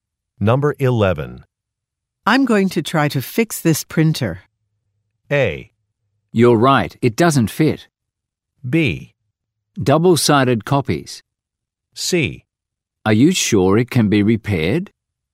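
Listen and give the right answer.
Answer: C: Are you sure it can be repaired?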